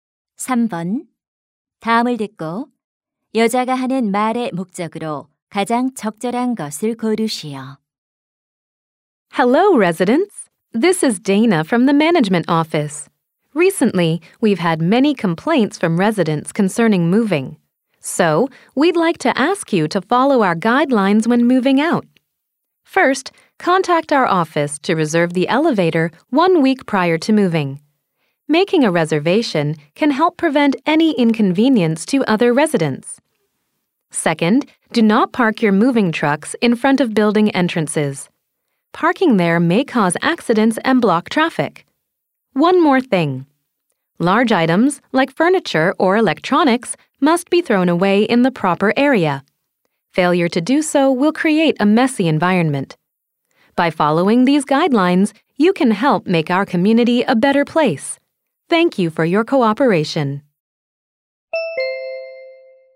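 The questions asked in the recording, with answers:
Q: 다음을 듣고 여자가 하는 말의 목적으로 가장 적절한 것을 고르시오.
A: 이사할 때 지켜야 할 지침 준수를 요청하려고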